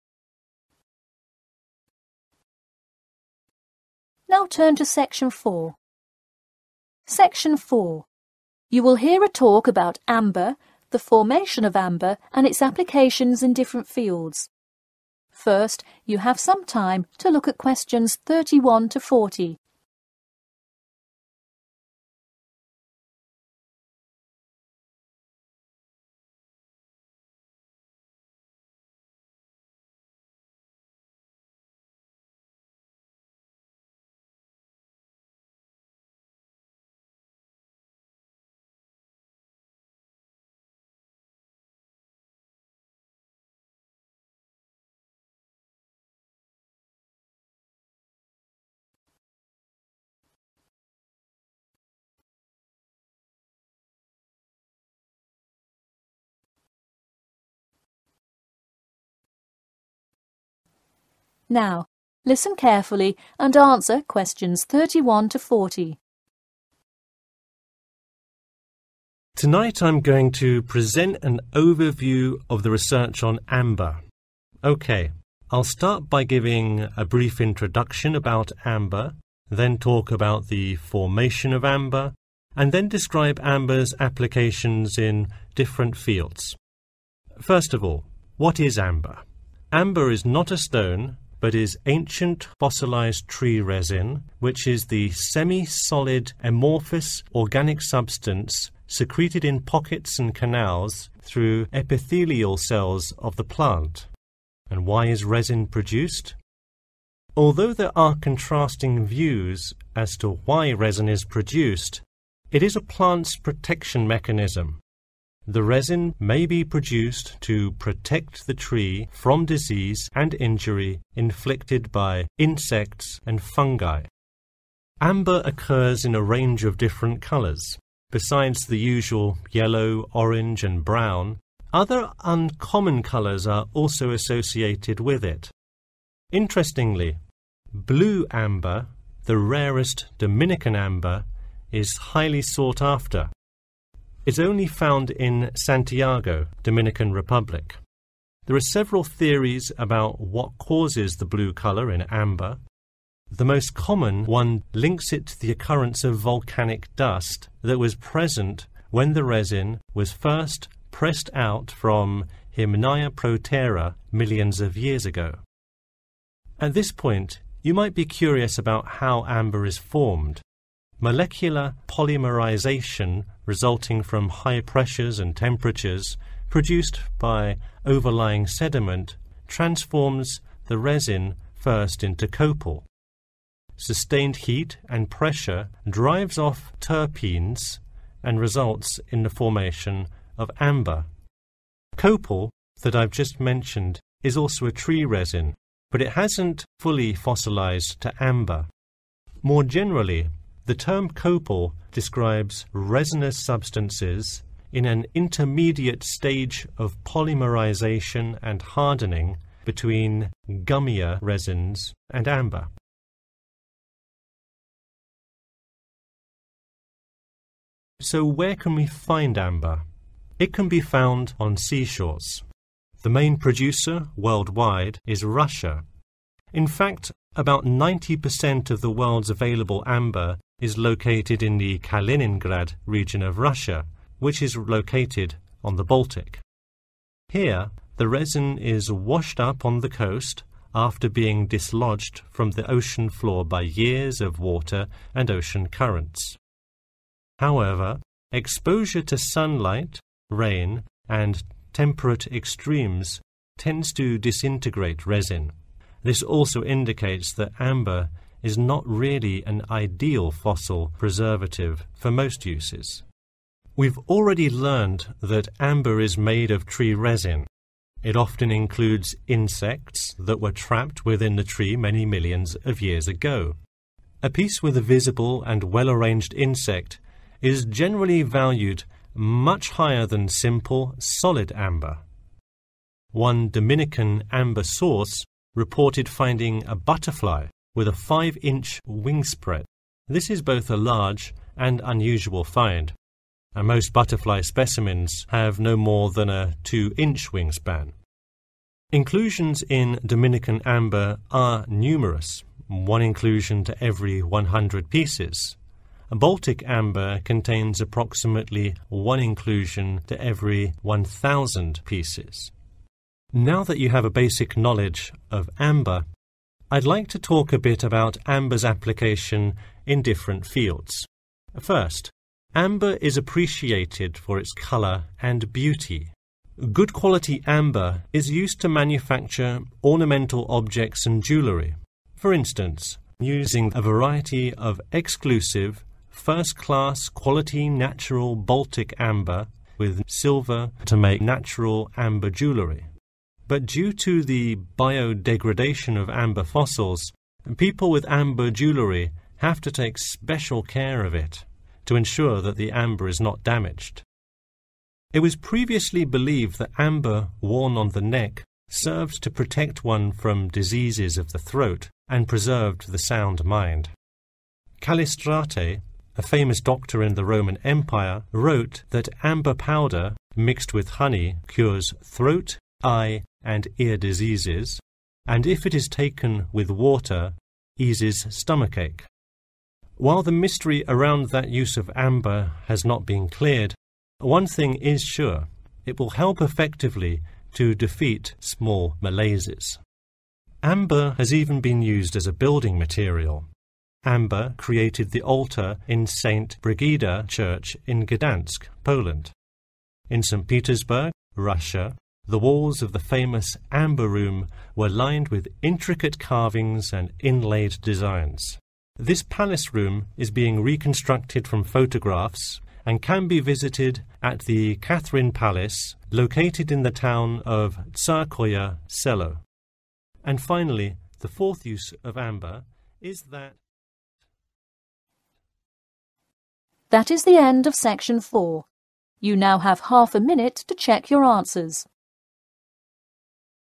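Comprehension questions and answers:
Complete the form below.Write NO MORE THAN THREE WORDS AND/OR A NUMBER for each answer.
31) Amber: a fossilised tree resin, which may be produced to protect itself against31. and fungi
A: insects

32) uncommon colors e.g. blue (what causes the blue color in amber is related to the occurrence of 32. )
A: volcanic dust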